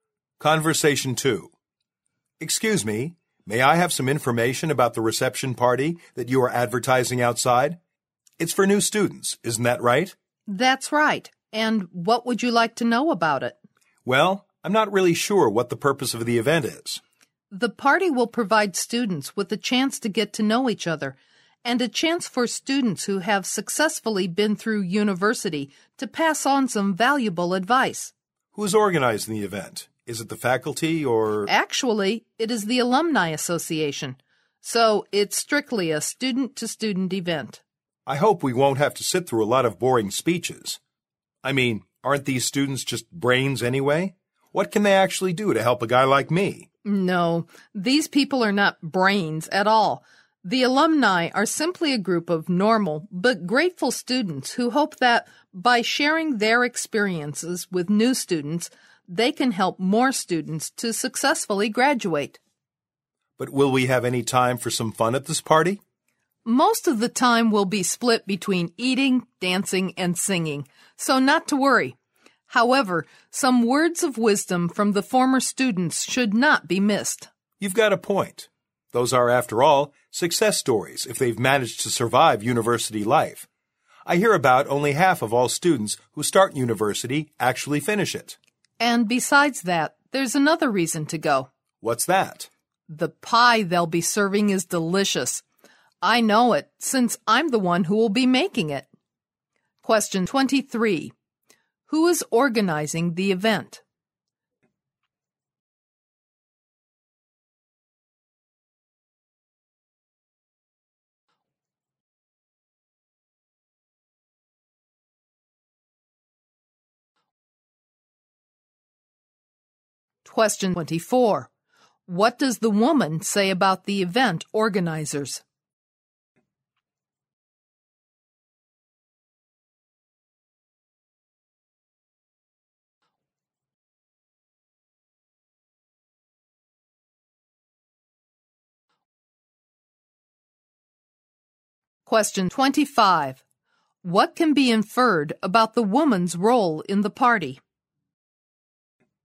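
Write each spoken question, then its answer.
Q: Who is organizing the event?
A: The Alumni Association

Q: What does the woman say about the event organizers?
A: They are normal but grateful former students who want to help new students graduate

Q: What can be inferred about the woman's role in the party?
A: She will make the pie served at the party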